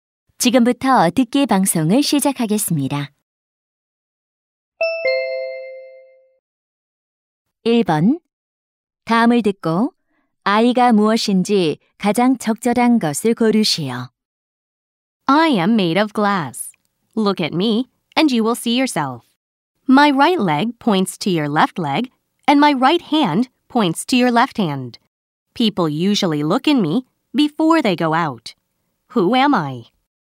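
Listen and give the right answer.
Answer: 거울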